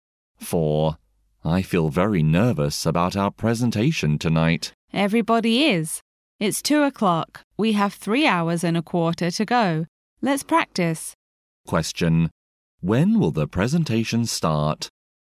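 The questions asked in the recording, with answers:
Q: When will the presentation start?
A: At 5:15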